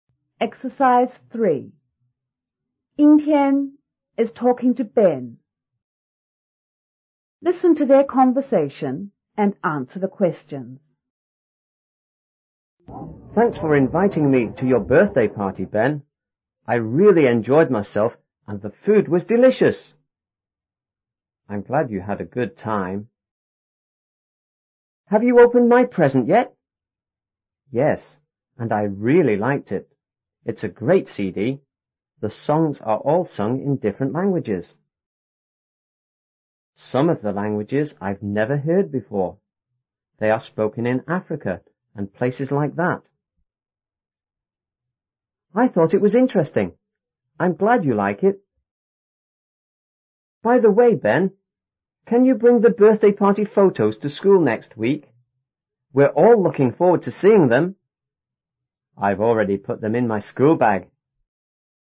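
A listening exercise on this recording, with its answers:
Listen to their conversation and answer the questions.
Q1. What is Ben glad about?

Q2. What did Yingtian give to Ben?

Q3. What has Ben not heard before?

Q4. What is Yingtian glad about?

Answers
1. That Yingtian had a good time at his birthday party.
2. A CD
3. Some of the languages on the CD
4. That Ben likes the present

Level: 初中英语广州版5B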